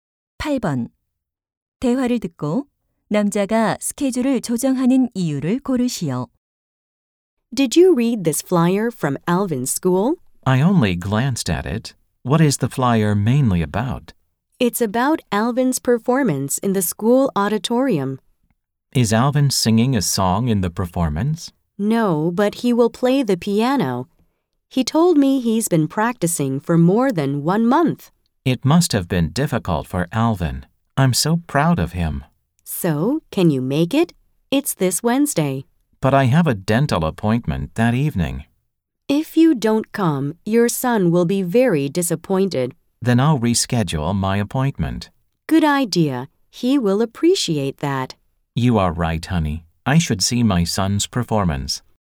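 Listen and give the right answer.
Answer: 아들의 피아노 공연을 보러 가기 위해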